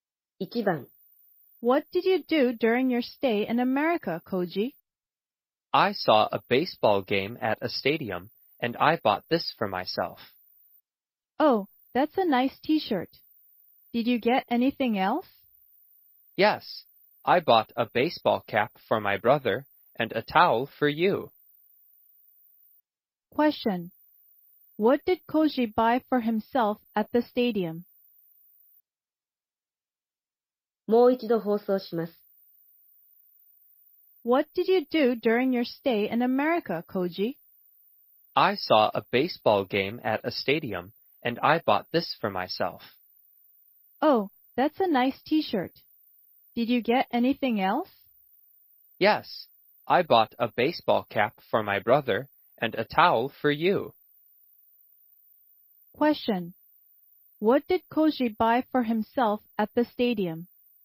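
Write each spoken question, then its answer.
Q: What did Koji buy for himself at the stadium?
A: a T-shirt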